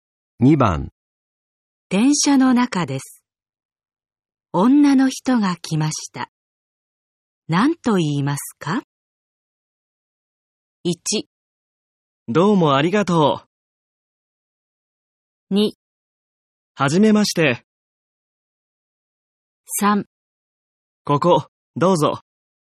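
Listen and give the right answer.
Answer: 3: ここ、どうぞ。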